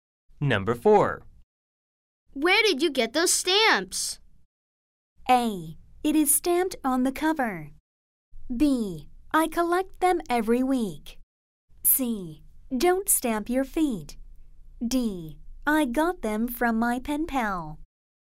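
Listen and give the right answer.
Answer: D: I got them from my pen pal.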